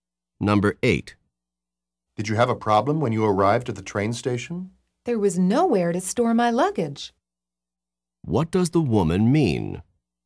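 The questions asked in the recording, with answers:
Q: What does the woman mean?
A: There was no place to store her luggage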